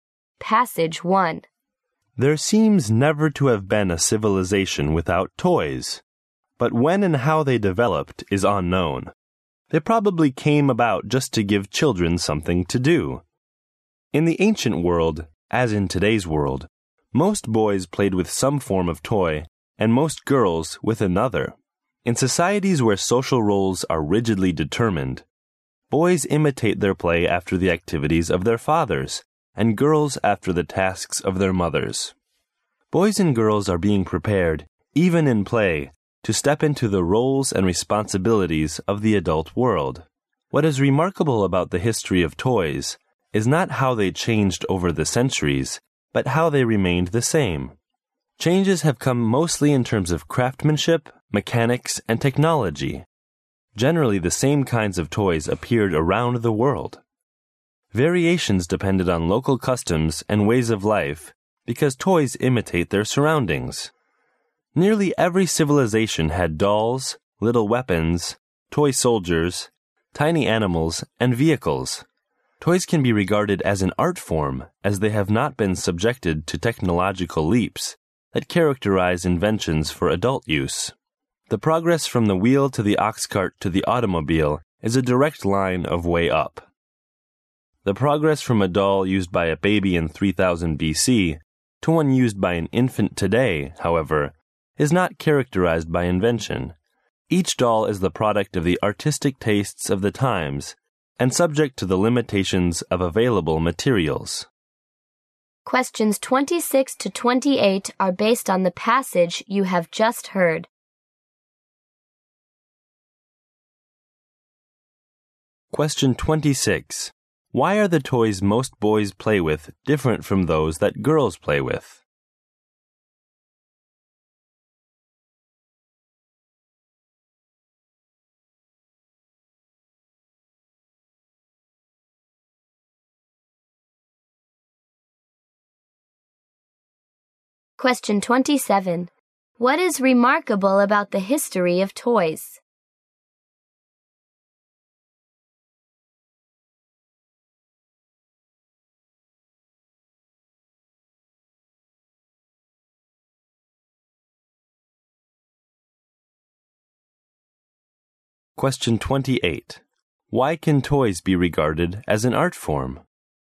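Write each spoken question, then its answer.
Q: Why are the toys most boys play with different from those that girls play with?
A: Boys imitate their fathers' activities and girls their mothers' tasks.

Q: What is remarkable about the history of toys?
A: Toys have stayed the same over the centuries.

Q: Why can toys be regarded as an art form?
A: They have not gone through technological leaps.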